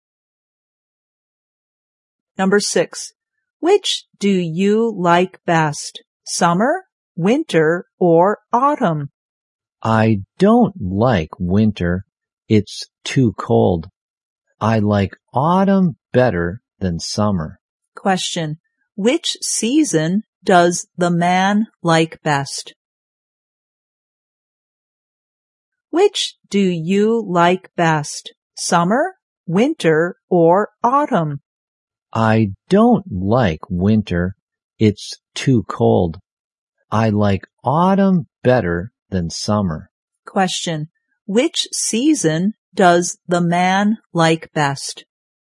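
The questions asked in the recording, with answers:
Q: which season does the man like best?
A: Autumn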